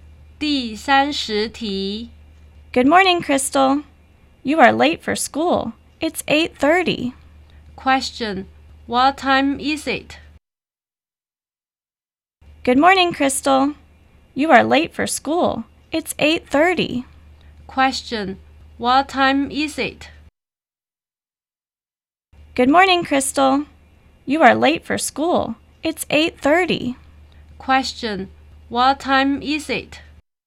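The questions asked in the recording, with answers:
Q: Question, what time is it?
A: It's 8:30.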